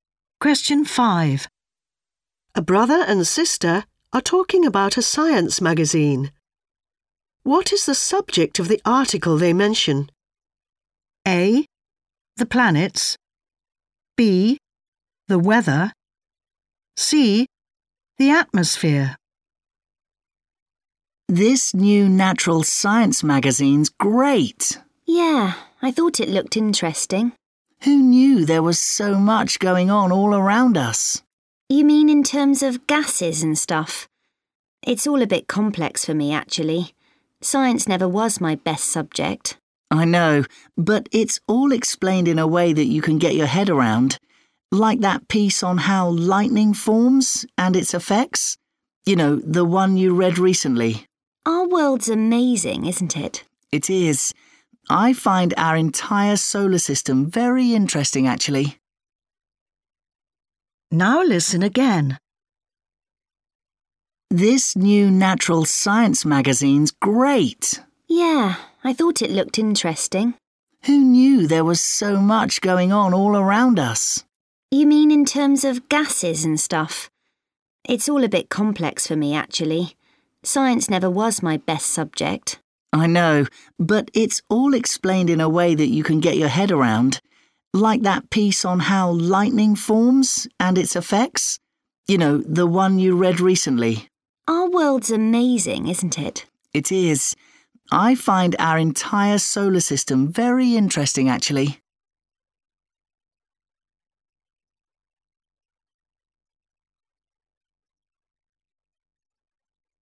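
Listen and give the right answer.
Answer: B: The weather.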